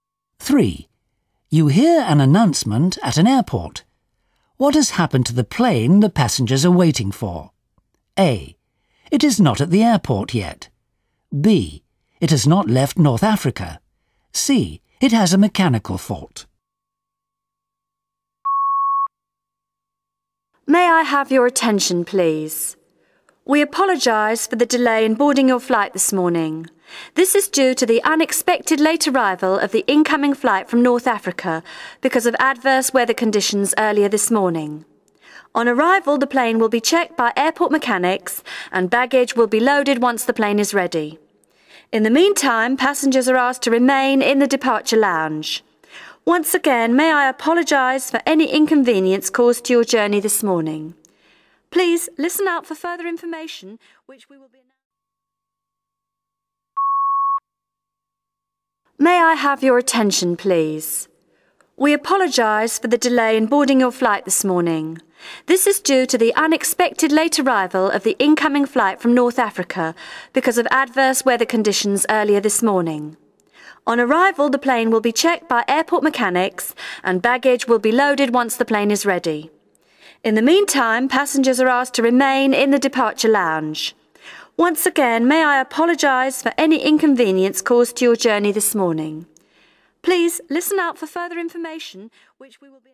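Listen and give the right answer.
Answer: A: It is not at the airport yet.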